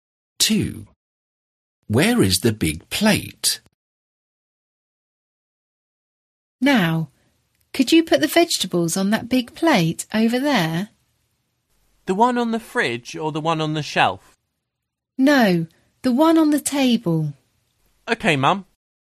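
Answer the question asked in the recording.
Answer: on the table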